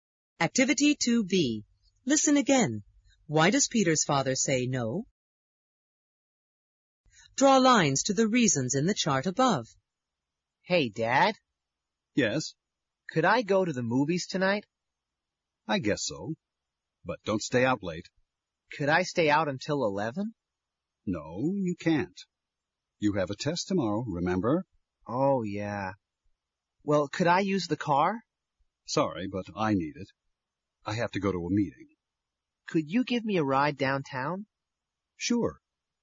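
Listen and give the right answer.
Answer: Peter has a test tomorrow (so he can't stay out until 11), and his father needs the car for a meeting.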